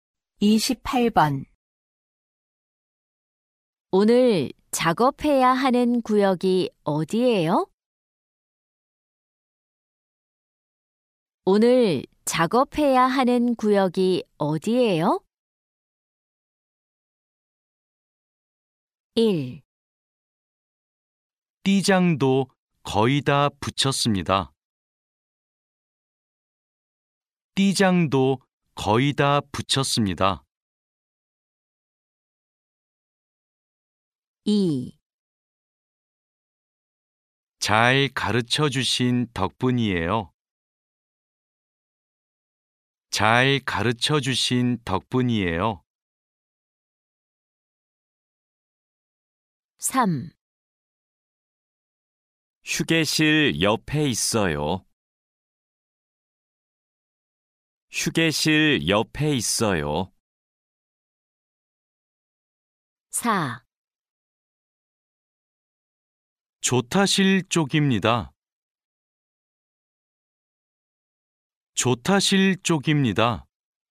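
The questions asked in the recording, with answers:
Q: 오늘 작업해야 하는 구역이 어디예요?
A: 4: 조타실 쪽입니다.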